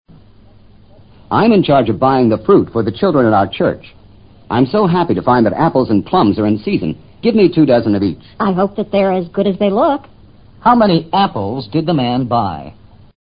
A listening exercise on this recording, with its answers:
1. How many apples did the man buy?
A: 24.